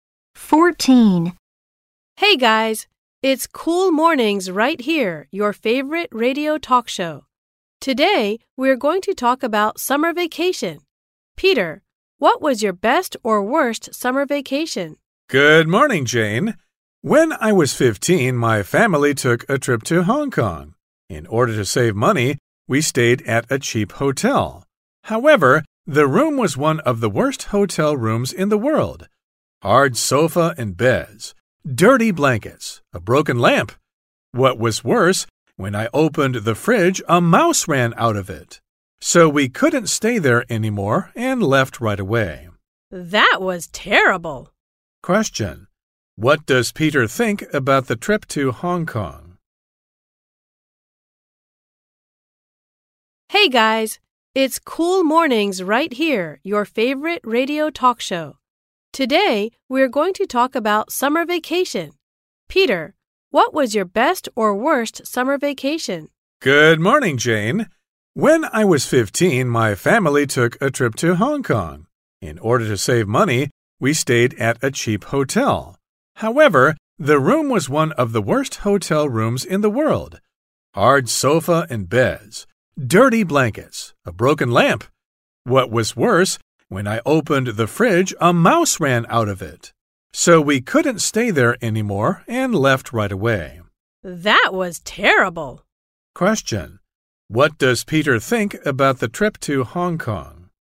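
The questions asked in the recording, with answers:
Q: What does Peter think about the trip to Hong Kong?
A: It was terrible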